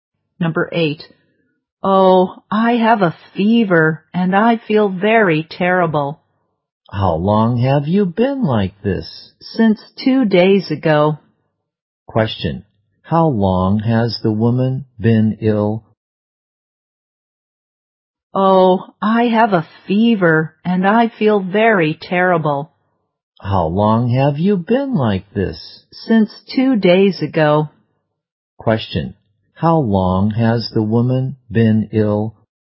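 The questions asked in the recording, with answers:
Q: How long has the woman been ill?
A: Two days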